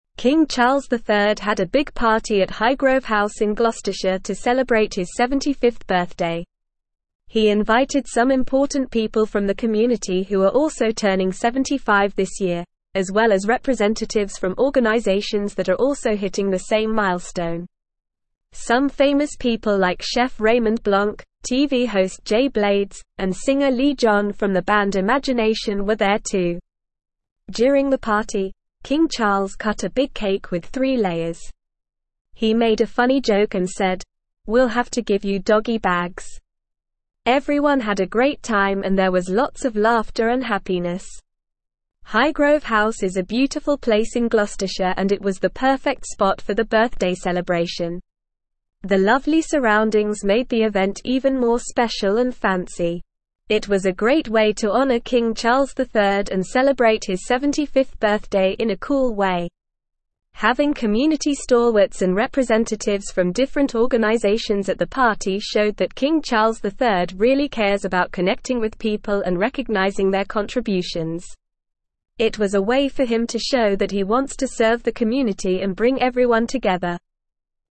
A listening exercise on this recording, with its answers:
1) King Charles III had a big (1)______ at Highgrove House in Gloucestershire to celebrate his 75th (2)______.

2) King Charles III had a big (1)______ at Highgrove House in Gloucestershire to celebrate his 75th (2)______.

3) He invited some important (3)______ from the community who are also turning 75 this year, as well as representatives from organizations that are also hitting the same (4)______.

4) He invited some important (3)______ from the community who are also turning 75 this year, as well as representatives from organizations that are also hitting the same (4)______.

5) Some famous people like chef Raymond (5)______, TV host Jay Blades, and singer Leee John from the band Imagination were there too.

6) During the party, King Charles cut a big cake with three (6)______.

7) He made a funny joke and said, "We'll have to give you (7)______ bags!"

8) Everyone had a (8)______ time and there was lots of laughter and happiness.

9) Highgrove House is a beautiful (9)______ in Gloucestershire and it was the perfect spot for the birthday celebration.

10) The lovely (10)______ made the event even more (11)______ and fancy.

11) The lovely (10)______ made the event even more (11)______ and fancy.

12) It was a great way to honor King (12)______ III and celebrate his 75th birthday in a cool way.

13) (13)______ community (14)______ and (15)______ from (16)______ organizations at the party showed that King Charles III really cares about connecting with people and recognizing their contributions.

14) (13)______ community (14)______ and (15)______ from (16)______ organizations at the party showed that King Charles III really cares about connecting with people and recognizing their contributions.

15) (13)______ community (14)______ and (15)______ from (16)______ organizations at the party showed that King Charles III really cares about connecting with people and recognizing their contributions.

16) (13)______ community (14)______ and (15)______ from (16)______ organizations at the party showed that King Charles III really cares about connecting with people and recognizing their contributions.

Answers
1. party
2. birthday
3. people
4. milestone
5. Blanc
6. layers
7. doggy
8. great
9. place
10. surroundings
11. special
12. Charles
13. Having
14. stalwarts
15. representatives
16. different

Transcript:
King Charles III had a big party at Highgrove House in Gloucestershire to celebrate his 75th birthday. He invited some important people from the community who are also turning 75 this year, as well as representatives from organizations that are also hitting the same milestone. Some famous people like chef Raymond Blanc, TV host Jay Blades, and singer Leee John from the band Imagination were there too.
During the party, King Charles cut a big cake with three layers. He made a funny joke and said, "We'll have to give you doggy bags!" Everyone had a great time and there was lots of laughter and happiness.
Highgrove House is a beautiful place in Gloucestershire and it was the perfect spot for the birthday celebration. The lovely surroundings made the event even more special and fancy. It was a great way to honor King Charles III and celebrate his 75th birthday in a cool way.
Having community stalwarts and representatives from different organizations at the party showed that King Charles III really cares about connecting with people and recognizing their contributions. It was a way for him to show that he wants to serve the community and bring everyone together.